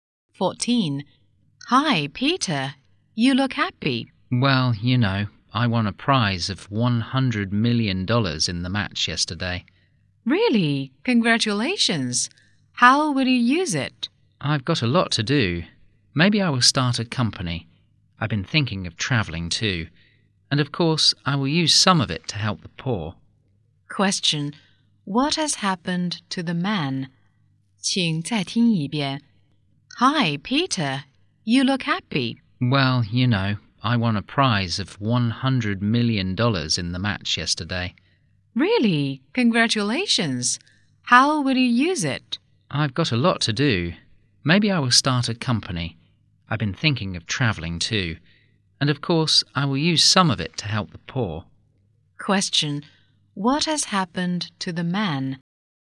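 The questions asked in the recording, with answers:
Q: Question. What has happened to the man?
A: He won a prize of $100 million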